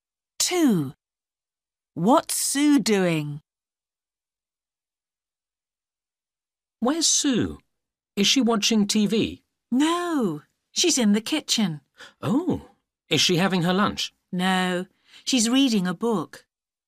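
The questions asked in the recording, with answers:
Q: What's Sue doing?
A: Reading a book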